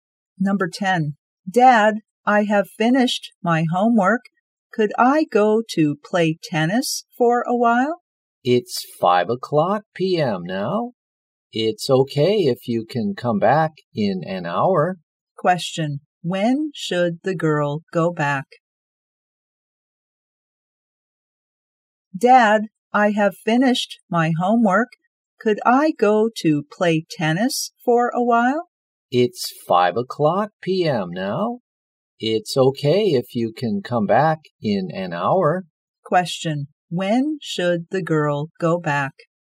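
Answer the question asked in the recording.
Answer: At 6 p.m.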